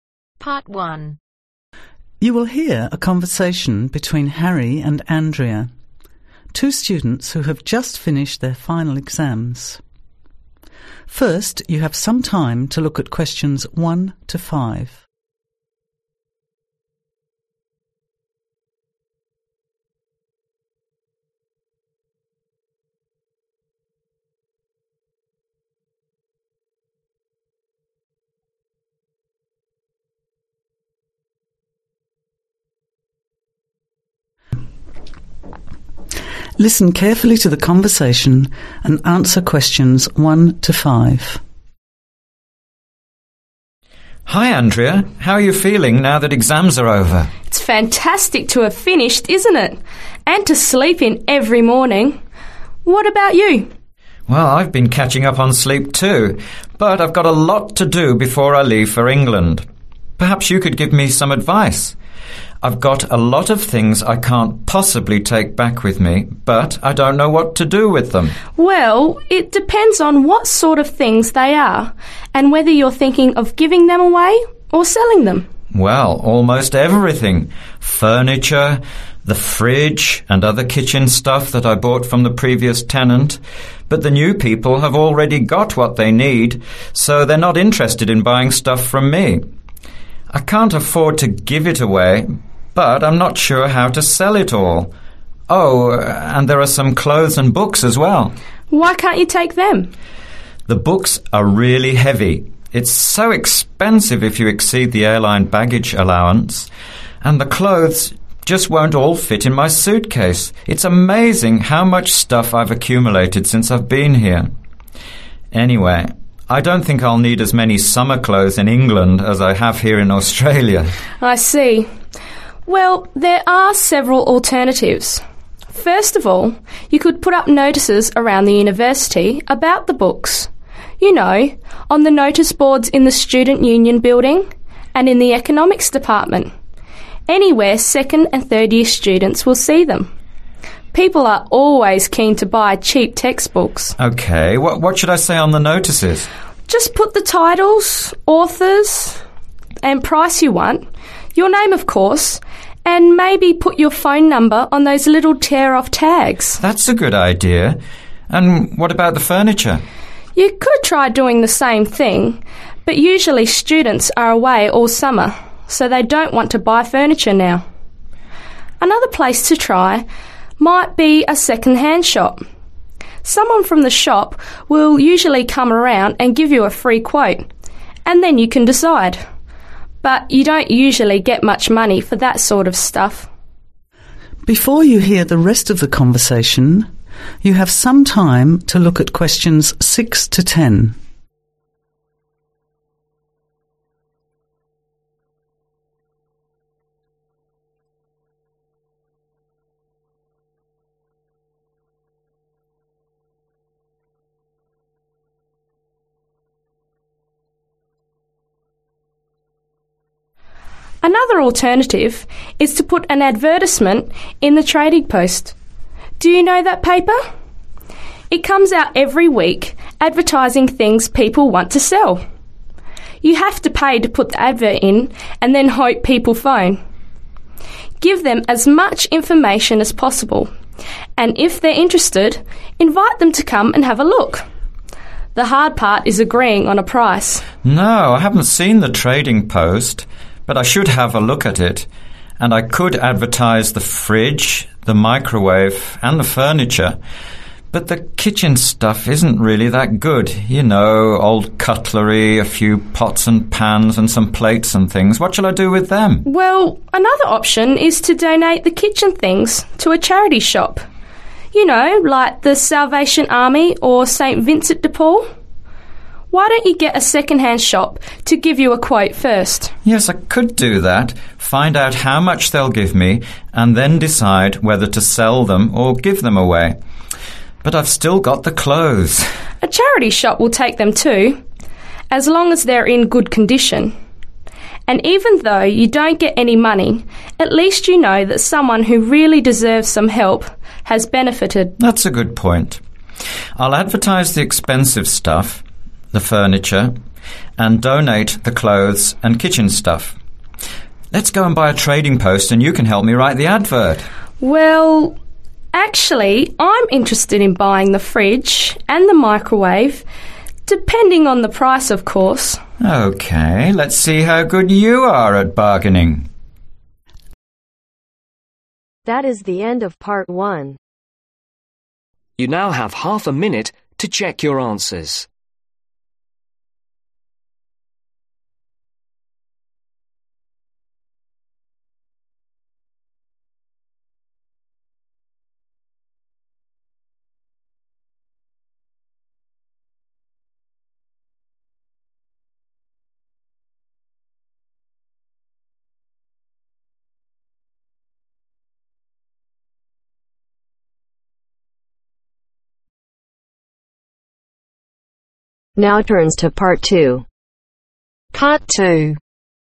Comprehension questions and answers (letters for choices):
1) What is Harry's problem ?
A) he doesn't want to sell his things.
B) what to do with his possessions.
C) he wants to take everything to England.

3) Where is Harry going to advertise his books for sale ?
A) In the university bookshop.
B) In the student newspaper.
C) In the economics department.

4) Andrea thinks it is unlikely students will buy the furniture because .....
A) they're all doing the same thing.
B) they live at home.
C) its's the summer vacation.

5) Andrea thinks that a second hand shop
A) may not pay well.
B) may not take your goods.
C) may only take free goods.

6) ........... furniture etc in Trading Post.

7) ........... or sell kitchen things.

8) Get (8) .......... first from second hand shop.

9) Give clothes to (9) .......... shop.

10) ........... fridge and microwave to Andrea.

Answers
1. B
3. C
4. C
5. A
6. ADVERTISE
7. DONATE
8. QUOTE
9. CHARITY
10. SELL